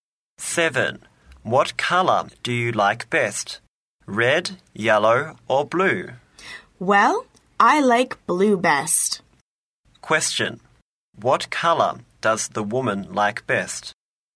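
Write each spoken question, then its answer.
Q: What color does the woman like best?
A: Blue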